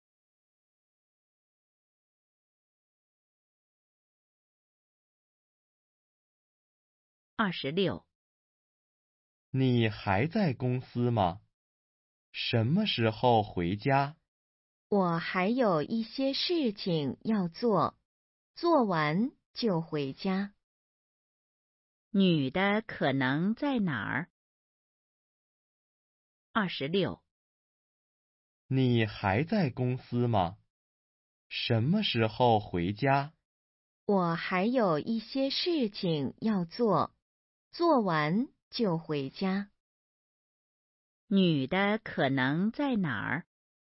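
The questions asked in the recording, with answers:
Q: 女的可能在哪儿?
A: 公司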